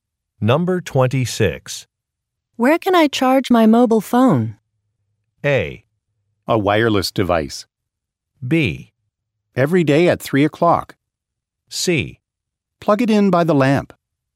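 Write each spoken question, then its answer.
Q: Where can I charge my mobile phone?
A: C: Plug it in by the lamp.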